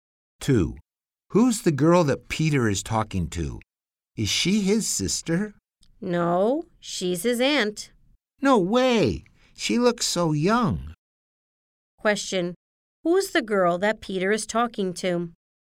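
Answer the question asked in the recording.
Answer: His aunt.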